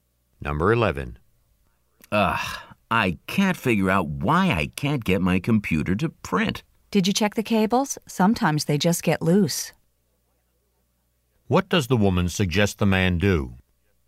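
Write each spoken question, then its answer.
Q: What does the woman suggest the man do?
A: Check whether the computer cables are loose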